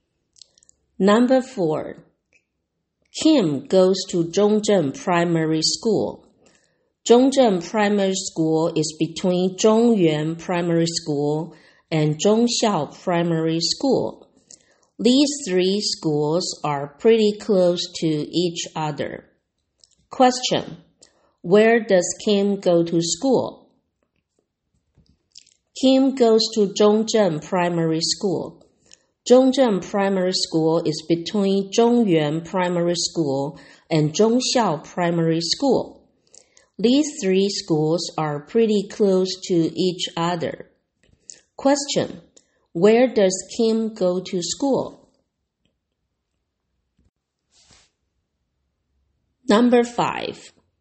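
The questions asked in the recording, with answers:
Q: Where does Kim go to school?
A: Zhongzheng Primary School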